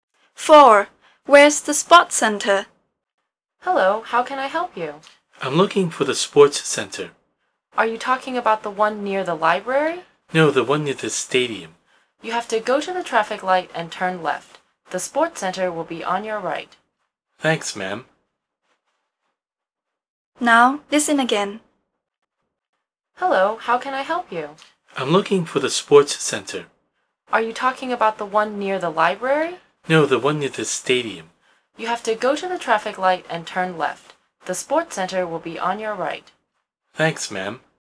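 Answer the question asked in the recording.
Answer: Near the stadium: turn left at the traffic light, and it is on the right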